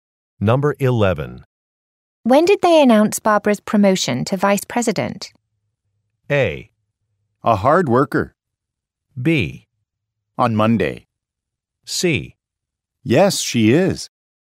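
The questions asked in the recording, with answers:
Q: When did they announce Barbara's promotion to vice president?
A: B: On Monday.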